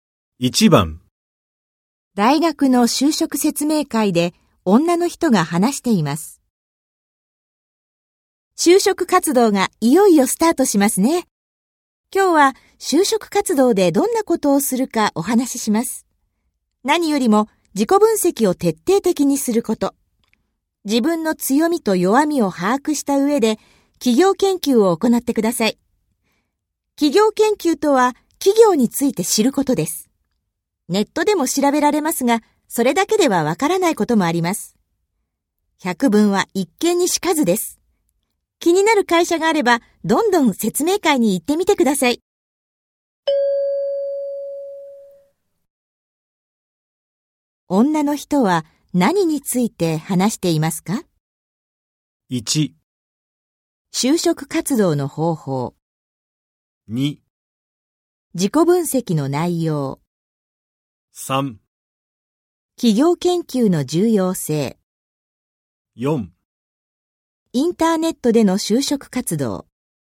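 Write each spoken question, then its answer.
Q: 女の人は何について話していますか?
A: 1: 就職活動の方法。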